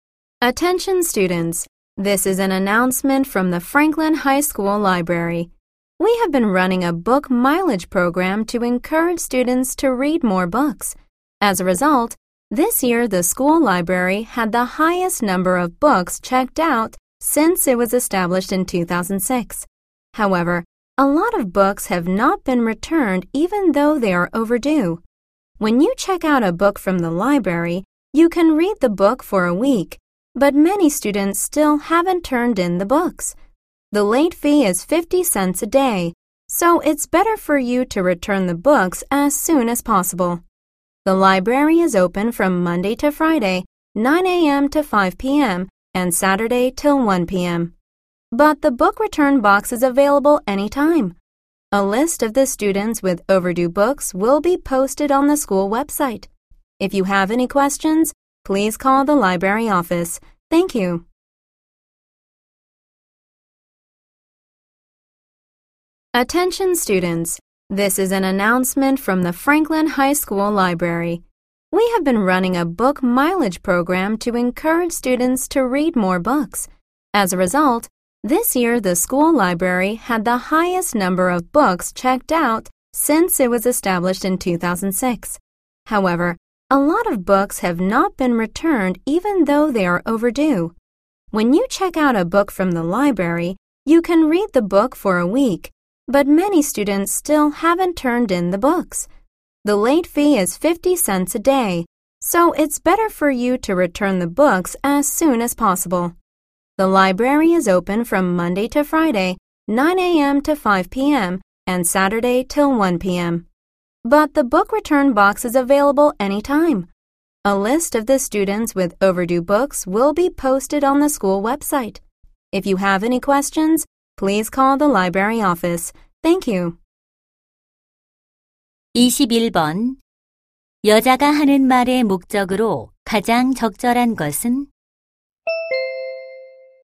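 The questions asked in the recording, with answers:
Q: 여자가 하는 말의 목적으로 가장 적절한 것은?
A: 연체된 도서의 반납을 독려하려고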